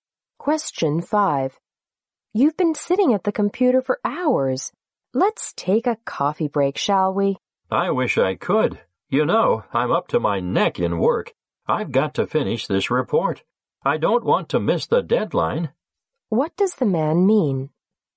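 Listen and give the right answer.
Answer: He is too busy with work to take a break.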